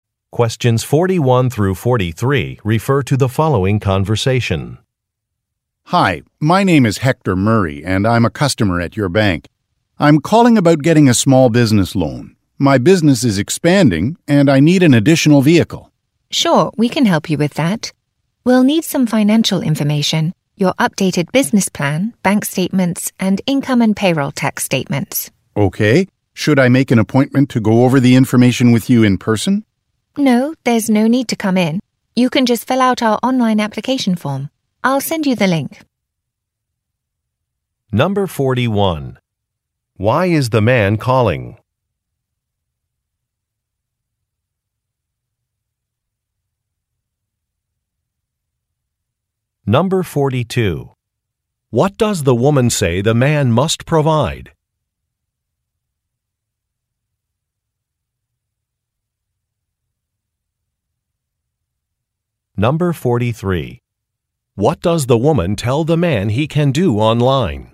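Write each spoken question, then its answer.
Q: Why is the man calling?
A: To ask about getting a small business loan

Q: What does the woman say the man must provide?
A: Financial information: an updated business plan, bank statements, and income and payroll tax statements

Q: What does the woman tell the man he can do online?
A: Fill out an application form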